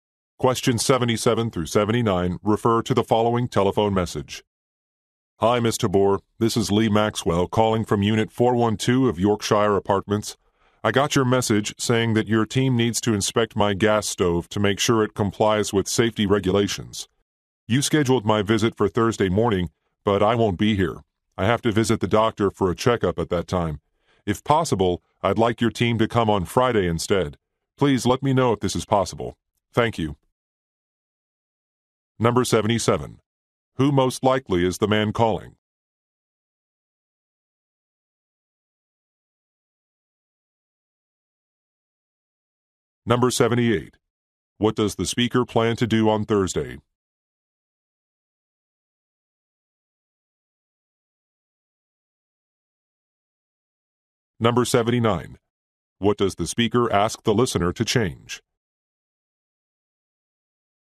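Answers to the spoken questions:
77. An apartment resident
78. Visit the doctor for a checkup
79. The inspection date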